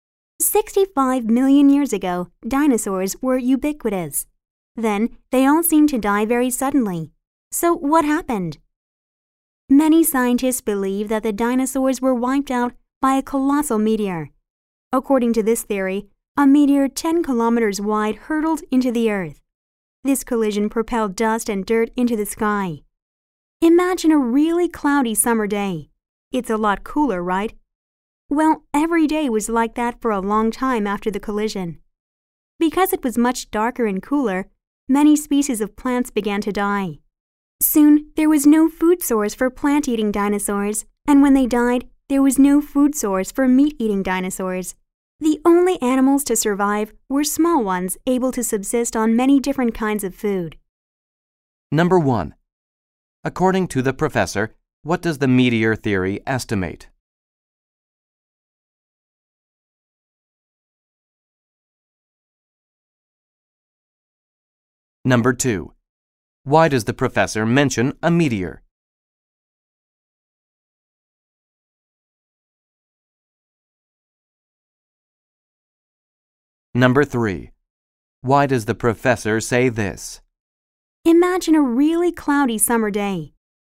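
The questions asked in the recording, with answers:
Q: Why does the professor mention a meteor?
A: To explain why the dinosaurs died out suddenly

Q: Why does the professor say this?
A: To show how dust from the collision made the Earth darker and cooler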